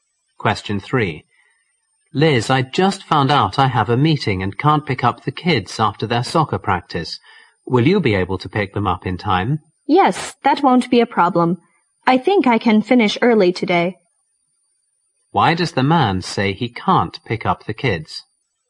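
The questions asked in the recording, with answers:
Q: Why does the man say he can't pick up the kids?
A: He has a meeting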